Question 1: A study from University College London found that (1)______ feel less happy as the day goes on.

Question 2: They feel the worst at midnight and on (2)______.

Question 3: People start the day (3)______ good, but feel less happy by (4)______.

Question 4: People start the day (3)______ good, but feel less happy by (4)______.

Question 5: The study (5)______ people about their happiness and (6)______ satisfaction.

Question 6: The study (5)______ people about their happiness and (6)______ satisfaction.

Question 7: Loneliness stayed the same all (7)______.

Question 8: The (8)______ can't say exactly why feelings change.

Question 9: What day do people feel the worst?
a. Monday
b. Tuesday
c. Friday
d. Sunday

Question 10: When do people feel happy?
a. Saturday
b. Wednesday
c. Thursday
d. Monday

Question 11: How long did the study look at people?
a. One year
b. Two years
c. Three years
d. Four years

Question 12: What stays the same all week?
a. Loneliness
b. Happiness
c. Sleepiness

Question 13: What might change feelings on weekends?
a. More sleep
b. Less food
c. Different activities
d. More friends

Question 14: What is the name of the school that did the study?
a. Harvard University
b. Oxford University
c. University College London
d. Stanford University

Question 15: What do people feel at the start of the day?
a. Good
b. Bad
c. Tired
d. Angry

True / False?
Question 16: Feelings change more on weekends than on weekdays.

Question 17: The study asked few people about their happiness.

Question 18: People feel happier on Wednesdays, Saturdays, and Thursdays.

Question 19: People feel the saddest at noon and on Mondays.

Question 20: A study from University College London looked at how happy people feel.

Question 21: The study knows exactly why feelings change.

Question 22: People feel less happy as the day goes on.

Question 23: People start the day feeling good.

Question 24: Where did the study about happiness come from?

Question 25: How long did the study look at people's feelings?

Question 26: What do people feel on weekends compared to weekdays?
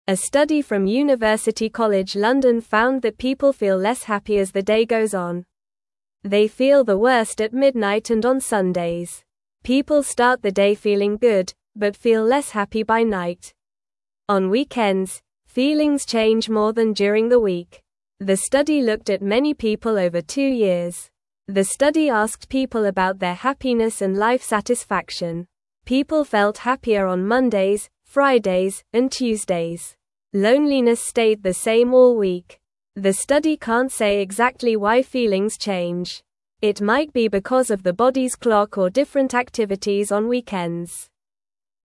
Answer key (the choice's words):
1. people
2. Sundays
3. feeling
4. night
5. asked
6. life
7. week
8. study
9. Sunday
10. Monday
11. Two years
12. Loneliness
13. Different activities
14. University College London
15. Good
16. True
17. False
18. False
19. False
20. True
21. False
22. True
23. True
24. It came from University College London.
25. The study looked at people's feelings for two years.
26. People's feelings change more on weekends than on weekdays.

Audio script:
A study from University College London found that people feel less happy as the day goes on. They feel the worst at midnight and on Sundays. People start the day feeling good, but feel less happy by night. On weekends, feelings change more than during the week. The study looked at many people over two years.
The study asked people about their happiness and life satisfaction. People felt happier on Mondays, Fridays, and Tuesdays. Loneliness stayed the same all week. The study can't say exactly why feelings change. It might be because of the body's clock or different activities on weekends.

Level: Level 1